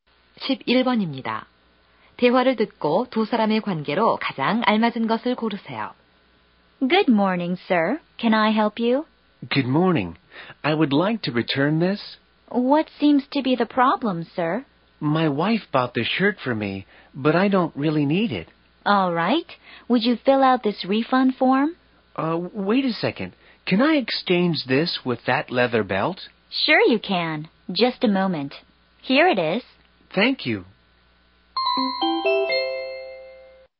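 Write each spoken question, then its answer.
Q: 대화를 듣고 두 사람의 관계로 가장 알맞은 것을 고르세요.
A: 점원과 손님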